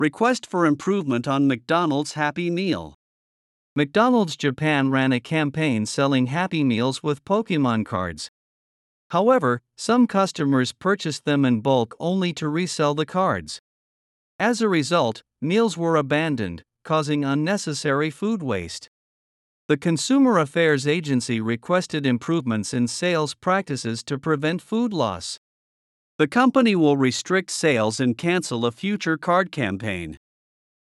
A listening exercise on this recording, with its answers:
英語ニュースの音声を聞き、各空欄に入る英文を正確に書き取ってください。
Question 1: McDonald's Japan ( ) with Pokemon cards.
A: ran a campaign selling Happy Meals

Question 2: However, ( ) only to resell the cards.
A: some customers purchased them in bulk

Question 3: As a result, meals were abandoned, ( ).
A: causing unnecessary food waste

次の各質問の答えを探しながら聞きましょう。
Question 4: Why did some customers purchase Happy Meals in bulk?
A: To resell Pokemon cards.

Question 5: What did the Consumer Affairs Agency request?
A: It requested improvements in sales practices to prevent food loss.

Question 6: What measures will McDonald's Japan take?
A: It will restrict sales and cancel a future card campaign.

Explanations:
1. 「McDonald's Japan」(三人称単数)が主語なので、動詞は「run」にはなりません。また、既に起きた出来事の話をしているため、動詞は過去形です。
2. 「in bulk(大量に、まとめて)」 は表現自体を知らないと聞き取れません。 bulk」の音はカタカナの「バルク」ではなく、「バーク」に近いイメージです。Lはほとんど発音されませんん。
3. unnecessary food waste(不必要な食品廃棄)」という意味なので、「a necessary food waste(必要な食品廃棄)」と逆の意味にすると文脈に合いません。また、「waste」は不可算名詞です。

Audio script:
Request for Improvement on McDonald's Happy Meal
McDonald's Japan ran a campaign selling Happy Meals with Pokemon cards.
However, some customers purchased them in bulk only to resell the cards.
As a result, meals were abandoned, causing unnecessary food waste.
The Consumer Affairs Agency requested improvements in sales practices to prevent food loss.
The company will restrict sales and cancel a future card campaign.